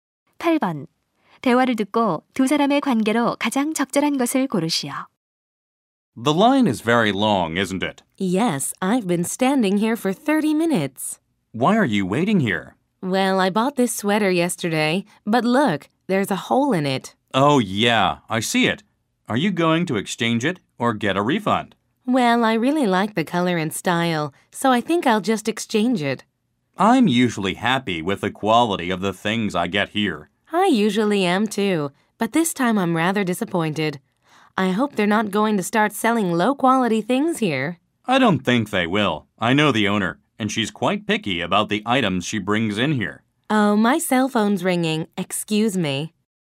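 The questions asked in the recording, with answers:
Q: 대화를 듣고 두 사람의 관계로 가장 적절한 것을 고르시오.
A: 가게에서 줄 서 있는 손님과 손님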